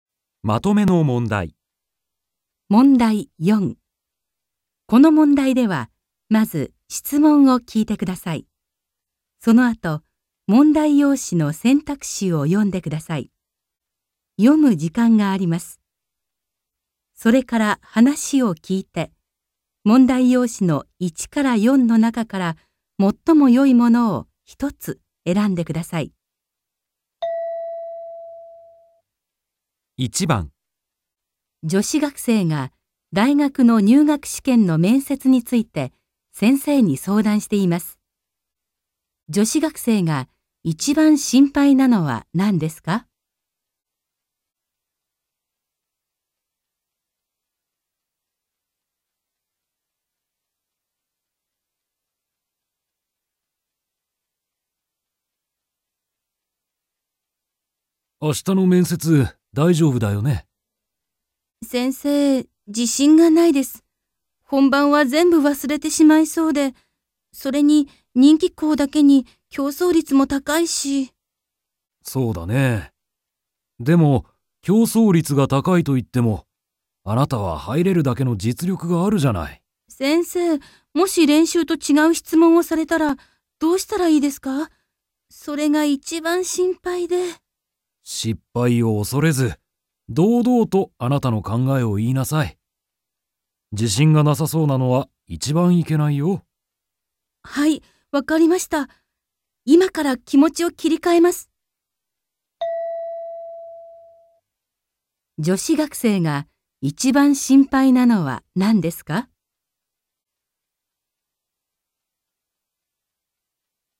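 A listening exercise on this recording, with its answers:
1.この問題では、まず質問を聞いてください。 そのあと、問題用紙の選択肢を読んでください。読む時間があります。 それから話を聞いて、問題用紙の1から4の中から、最もよいものを一つ選んでください。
女子学生が一番心配なのは何ですか。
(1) 希望の大学は競争率が高いこと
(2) 試験のとき、練習したことを全部忘れること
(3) 練習をしなかったこと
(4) 練習と違う質問をされること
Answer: 練習と違う質問をされること

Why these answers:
先生、もし練習と違う質問をされたら、 どうしたらいいですか。それが一番心配で・・・。

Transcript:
M: 明日の面接、大丈夫だよね。
F: 先生、自信がないです。本番は全部忘れてしまいそうで。それに人気校だけに、競争率も高いし。
M: そうだね。でも、競争率が高いといっても、あなたは入れるだけの実力があるじゃない。
F: 先生、もし練習と違う質問をされたら、 どうしたらいいですか。それが一番心配で・・・。

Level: N2

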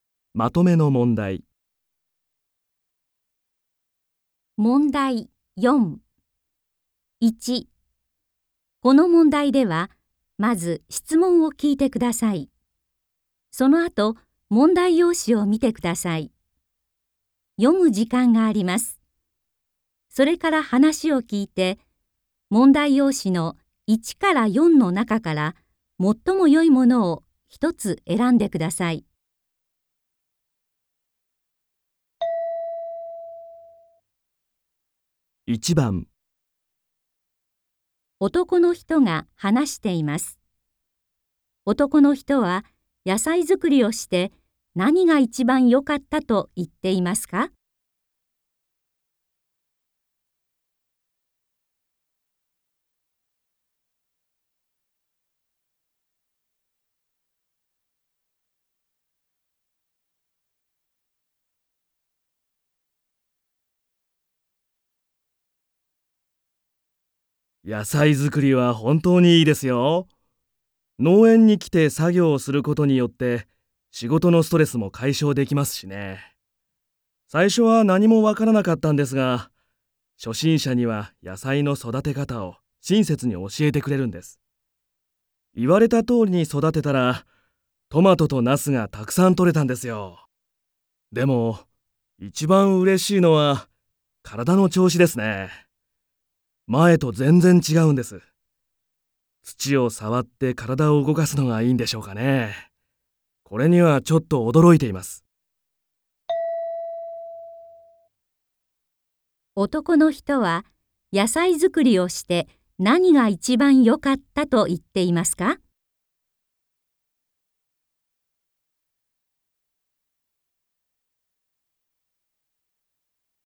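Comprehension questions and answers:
この問題では、まず質問を聞いてください。そのあと、問題用紙を見てください。読む時間があります。それから話を聞いて、問題用紙の1から4の中から、最もよいものを一つえらんでください。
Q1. 男の人は野菜作りをして何がいちばんよかったと言っていますか。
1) ストレス解消かいしょうができたこと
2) 野菜やさいそだかたがわかったこと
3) トマトとナスがとれたこと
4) 体調たいちょうがよくなったこと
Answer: 体調たいちょうがよくなったこと

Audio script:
1. この問題では、まず質問を聞いてください。そのあと、問題用紙を見てください。読む時間があります。
2. この問題では、絵を見ながら質問を聞いてください。矢印(→)の人は何と言いますか。1から3の中から、最もよいものを一つ選んでください。
それから話を聞いて、問題用紙の1から4の中から、最もよいものを一つえらんでください。
1.男の人が話しています。男の人は野菜作りをして何がいちばんよかったと言っていますか。
M: 野菜作りは本当にいいですよ。農園に来て作業をすることによって、仕事のストレスも解消できますしね。最初は何もわからなかったんですが、初心者には、野菜の育て方を、親切に教えてくれるんです。言われたとおりに育てたら、トマトとナスがたくさんとれたんですよ。でも、いちばんうれしいのは体の調子ですね。前とぜんぜん違うんです。土を触って体を動かすのがいいんでしょうかね。これにはちょっとおどろいています。

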